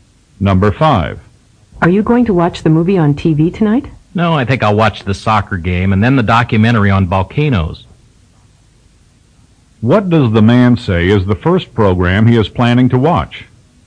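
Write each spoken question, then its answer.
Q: What does the man say is the first program he is planning to watch?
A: The soccer game.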